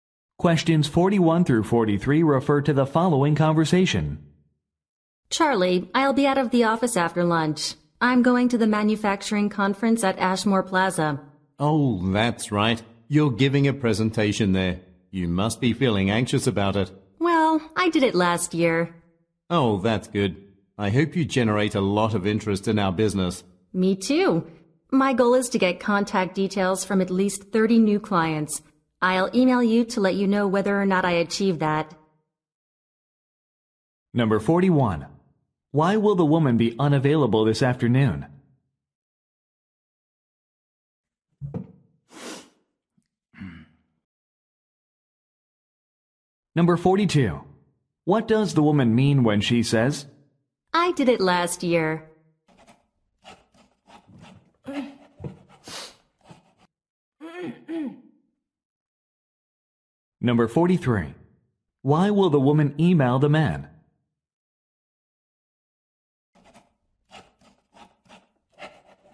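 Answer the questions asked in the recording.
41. She is going to a manufacturing conference to give a presentation
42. She is not nervous because she has experience
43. To tell him whether she got contact details from 30 new clients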